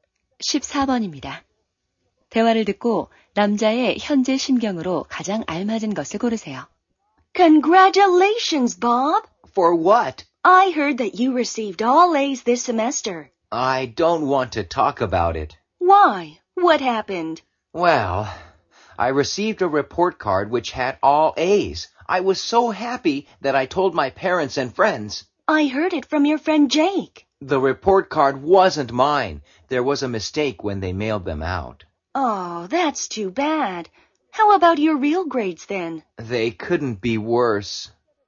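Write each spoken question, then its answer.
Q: 대화를 듣고 남자의 현재 심경으로 가장 알맞은 것을 고르세요.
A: 실망한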